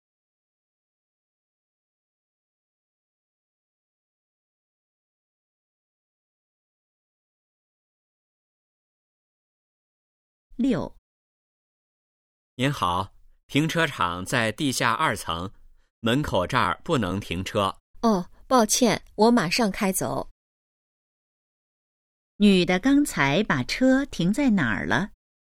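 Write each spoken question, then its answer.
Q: 女的刚才把车停在哪儿了?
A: 门口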